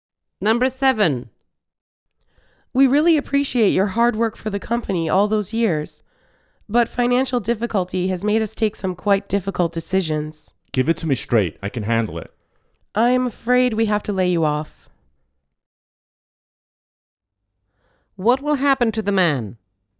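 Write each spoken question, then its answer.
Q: What will happen to the man?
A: He will be laid off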